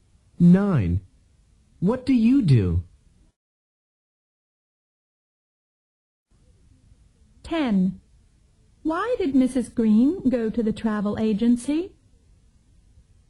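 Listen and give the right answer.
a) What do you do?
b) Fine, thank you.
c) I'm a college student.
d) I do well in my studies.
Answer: c) I'm a college student.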